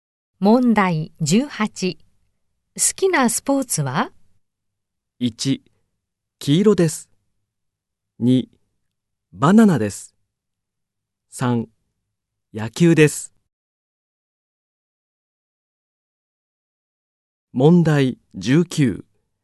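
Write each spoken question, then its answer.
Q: 好きなスポーツは?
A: 3: 野球です。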